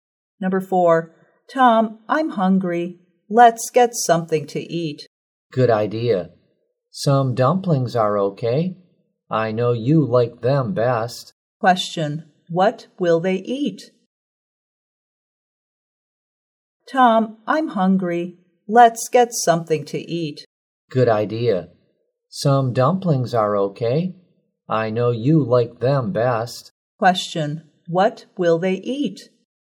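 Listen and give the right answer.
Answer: Dumplings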